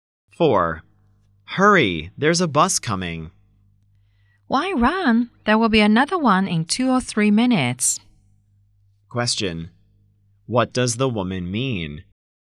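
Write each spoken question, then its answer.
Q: What does the woman mean?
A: There is no need to run; another bus will come soon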